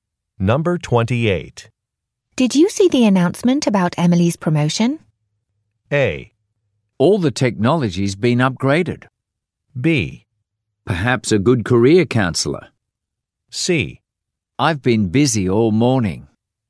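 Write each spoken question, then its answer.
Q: Did you see the announcement about Emily's promotion?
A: C: I've been busy all morning.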